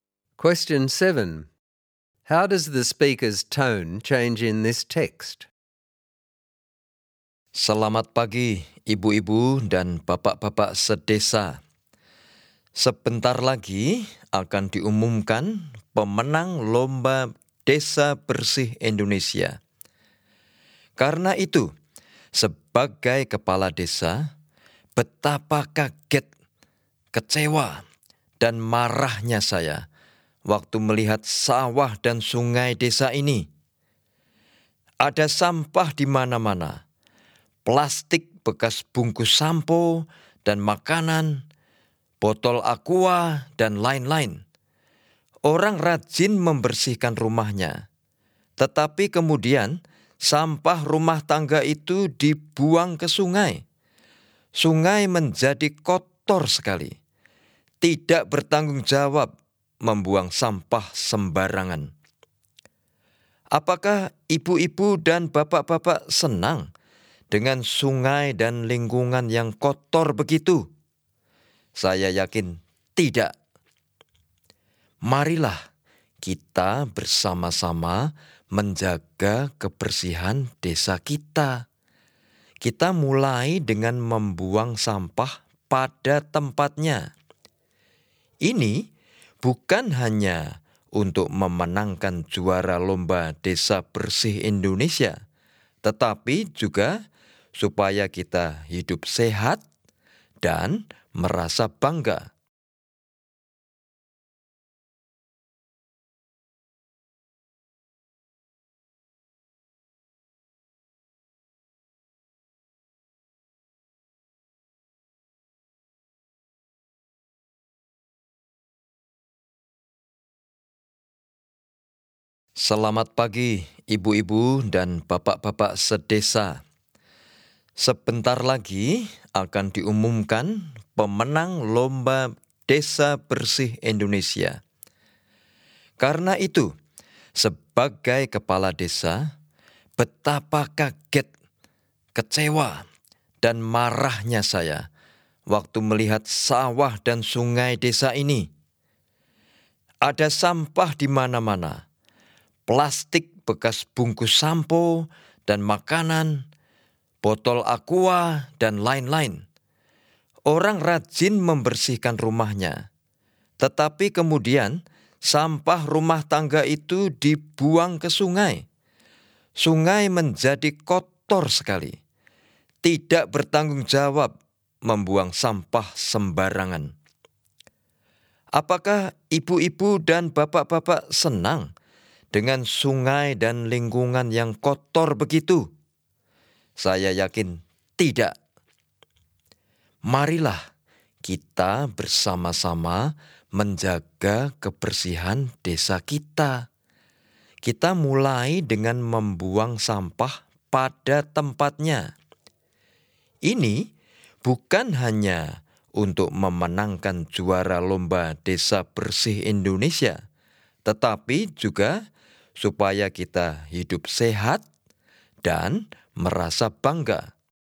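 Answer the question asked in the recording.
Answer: It starts shocked, disappointed and angry about the rubbish, then becomes encouraging and persuasive, urging everyone to keep the village clean together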